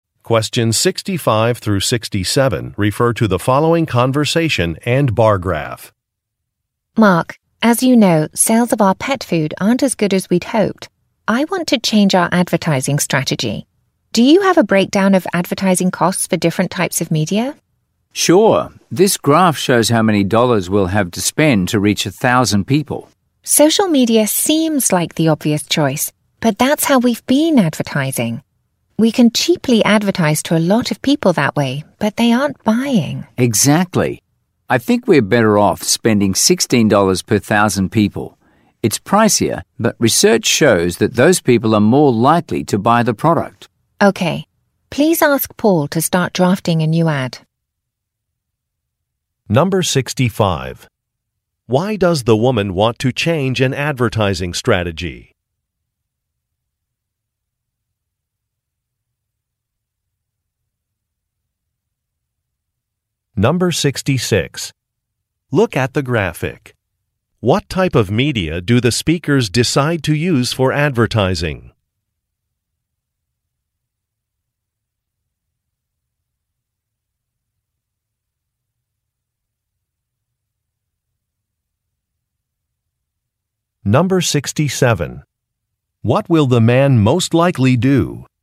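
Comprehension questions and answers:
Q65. Why does the woman want to change an advertising strategy?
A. A competitor has revised a prototype.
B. Some costs are too high.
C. A project was delayed.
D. A product is not selling well.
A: A product is not selling well.

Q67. What will the man most likely do?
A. Hire an extra employee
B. Conduct a customer survey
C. Prepare a slideshow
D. Contact a colleague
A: Contact a colleague

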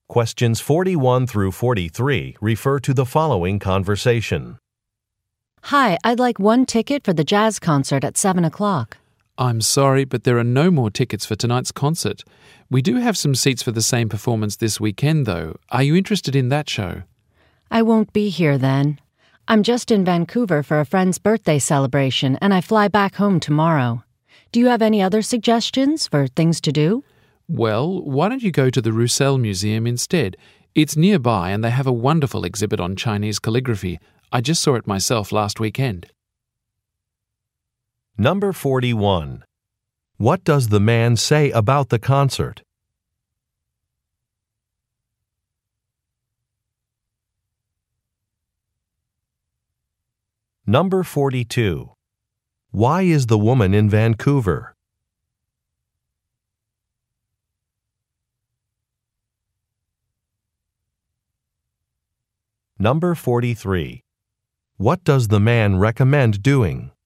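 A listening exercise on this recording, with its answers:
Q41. What does the man say about the concert?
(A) It has been moved.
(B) It is sold out.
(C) It received good reviews.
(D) It has already started.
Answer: It is sold out.

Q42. Why is the woman in Vancouver?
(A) To look for a new house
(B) To take part in a seminar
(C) To go to a party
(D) To attend a sports game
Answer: To go to a party

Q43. What does the man recommend doing?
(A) Seeing a museum exhibit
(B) Going on a walking tour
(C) Trying a popular café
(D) Visiting a historic site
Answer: Seeing a museum exhibit

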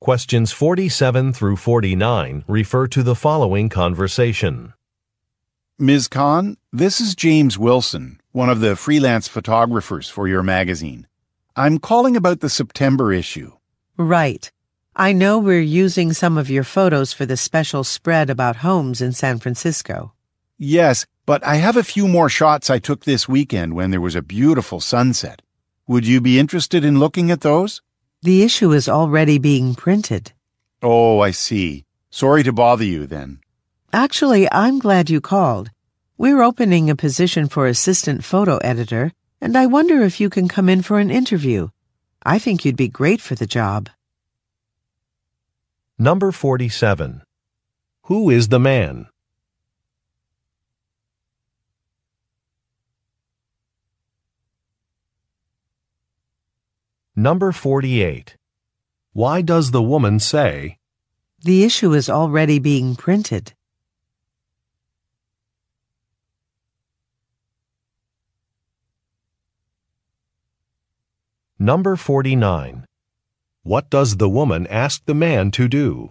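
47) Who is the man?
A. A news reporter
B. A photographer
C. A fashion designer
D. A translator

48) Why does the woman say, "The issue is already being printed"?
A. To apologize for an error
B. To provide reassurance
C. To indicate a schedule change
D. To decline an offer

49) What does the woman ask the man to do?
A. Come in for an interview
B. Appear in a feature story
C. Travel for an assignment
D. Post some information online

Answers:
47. A photographer
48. To decline an offer
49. Come in for an interview

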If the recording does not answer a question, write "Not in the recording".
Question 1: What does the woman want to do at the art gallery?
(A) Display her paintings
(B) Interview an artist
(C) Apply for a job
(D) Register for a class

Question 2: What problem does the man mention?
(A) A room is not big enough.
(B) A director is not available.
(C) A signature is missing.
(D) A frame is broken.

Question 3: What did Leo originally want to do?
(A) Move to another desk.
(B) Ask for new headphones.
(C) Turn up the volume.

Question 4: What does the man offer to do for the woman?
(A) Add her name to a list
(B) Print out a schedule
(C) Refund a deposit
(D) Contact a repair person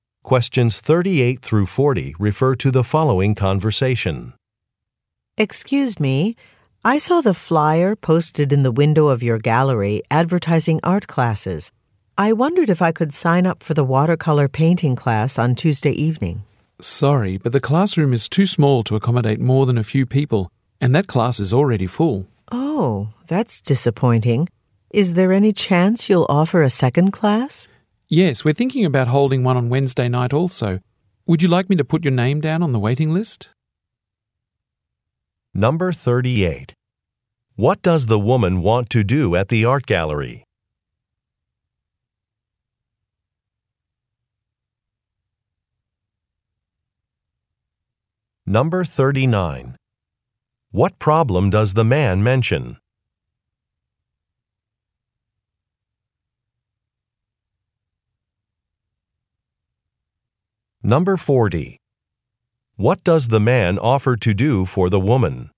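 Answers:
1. Register for a class
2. A room is not big enough.
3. Not in the recording
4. Add her name to a list

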